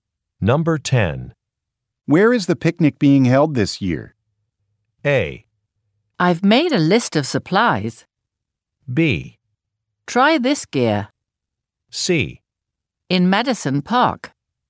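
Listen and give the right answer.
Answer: C: In Madison Park.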